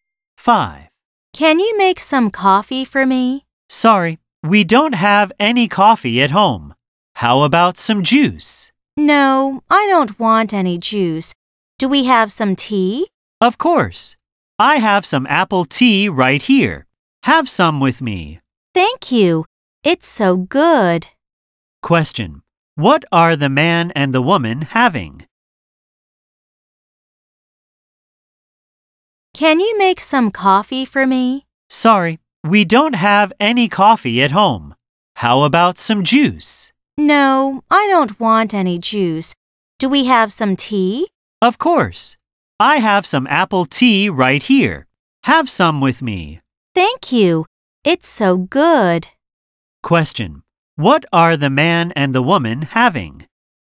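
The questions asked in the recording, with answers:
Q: What are the man and the woman having?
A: Apple tea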